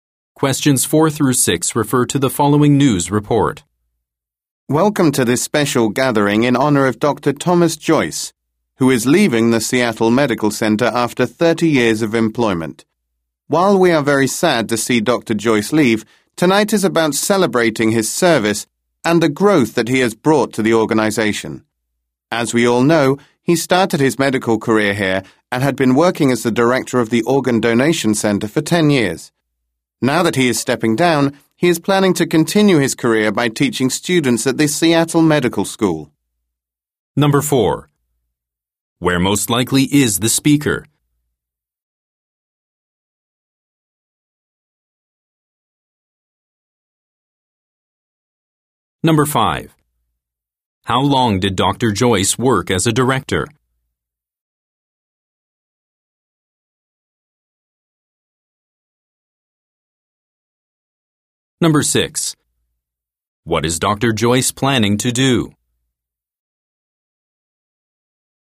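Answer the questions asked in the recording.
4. At a farewell gathering for Dr. Joyce
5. 10 years
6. Teach students at the Seattle Medical School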